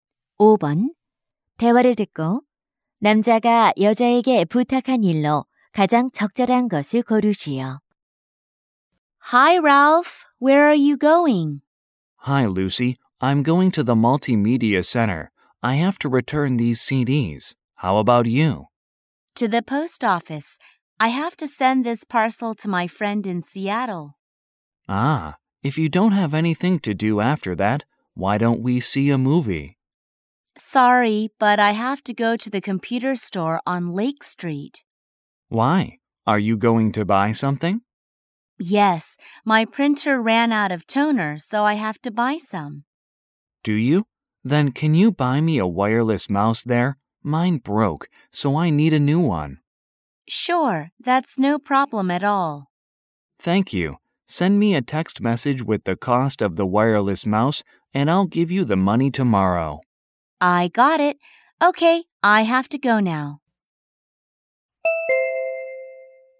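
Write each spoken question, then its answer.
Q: 대화를 듣고 남자가 여자에게 부탁한 일로 가장 적절한 것을 고르시오.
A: 무선 마우스 사다 주기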